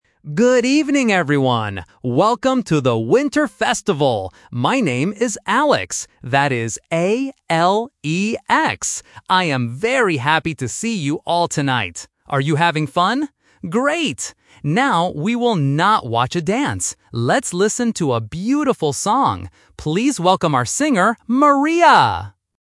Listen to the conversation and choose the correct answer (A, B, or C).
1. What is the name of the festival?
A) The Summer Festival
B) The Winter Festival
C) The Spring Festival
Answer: B

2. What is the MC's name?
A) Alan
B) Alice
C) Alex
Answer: C

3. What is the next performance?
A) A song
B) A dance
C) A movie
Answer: A

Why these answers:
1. The MC says, "Welcome to the Winter Festival." Trap: Options (A) and (C) are other seasons, but they are not mentioned in the audio.
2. The MC clearly introduces his name and spells it out: "My name is Alex. That is A-L-E-X." Trap: Options (A) and (B) are names that sound a bit similar or start with "Al", but they are incorrect.
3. The MC says, "Let's listen to a beautiful song." Trap: Option (B) is a very clear trap. The MC mentions a dance but rejects it: "Now, we will not watch a dance." Option (C) is not mentioned at all.

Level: A1

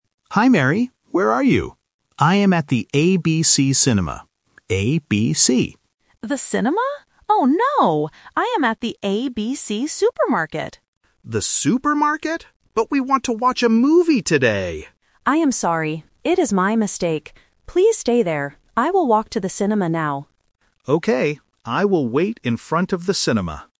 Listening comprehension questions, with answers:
Listen to the phone conversation between two friends. Read the questions and choose the correct answer (A, B, or C).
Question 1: Where is John waiting?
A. At the cinema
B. At the supermarket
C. At the restaurant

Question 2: Where is Mary now?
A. At the ACC Supermarket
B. At the ABC Supermarket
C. At the ABC Cinema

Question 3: What will Mary do next?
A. She will go home.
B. She will wait at the supermarket.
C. She will walk to the cinema.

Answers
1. A
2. B
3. C

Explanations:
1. John clearly states at the beginning, "I am at the ABC Cinema." Why the traps are wrong: Option B is a trap because the supermarket is mentioned, but Mary is there, not John. Option C is a plausible place to meet but is never mentioned.
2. Mary realizes her mistake and says, "I am at the ABC Supermarket." Why the traps are wrong: Option A is a phonetic trap ("ACC" sounds similar to "ABC"). Option C is a trap because the cinema is where John is, not Mary.
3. Mary tells John, "I will walk to the cinema now." Why the traps are wrong: Option A is a plausible action but is not mentioned. Option B is a trap because Mary says "Please stay there" to John, meaning she will move, not wait.

